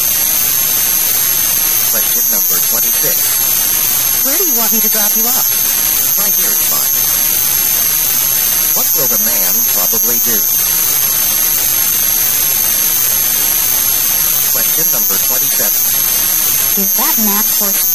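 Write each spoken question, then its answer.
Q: What will the man probably do?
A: Get out of the car here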